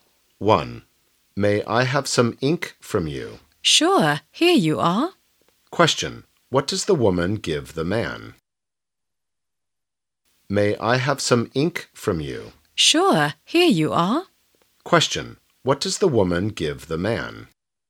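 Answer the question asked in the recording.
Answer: Some ink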